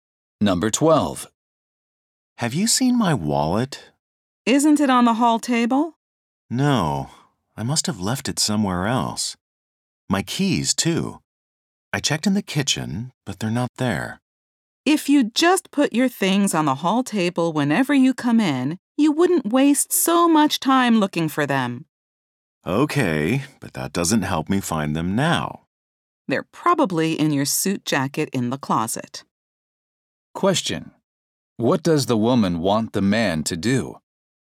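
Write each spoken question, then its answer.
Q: What does the woman want the man to do?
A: Always put his things on the hall table when he comes in.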